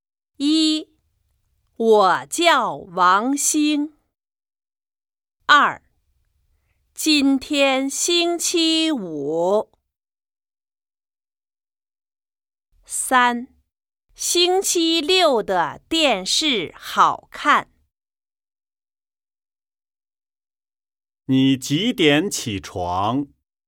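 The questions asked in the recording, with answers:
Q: 今天星期几?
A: 二: 今天星期五。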